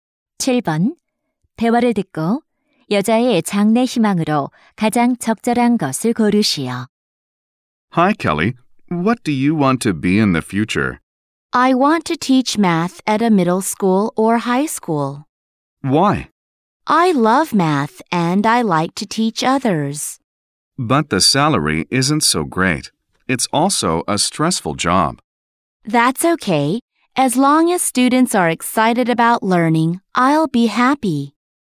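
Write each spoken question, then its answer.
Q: 대화를 듣고 여자의 장래 희망으로 가장 적절한 것을 고르시오.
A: 수학 교사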